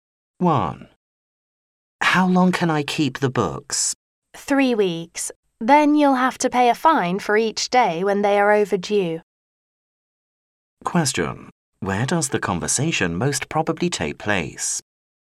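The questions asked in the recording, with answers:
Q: Where does the conversation most probably take place?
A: In a library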